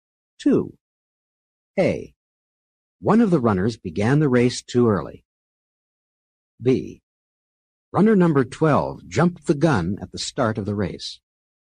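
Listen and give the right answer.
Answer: same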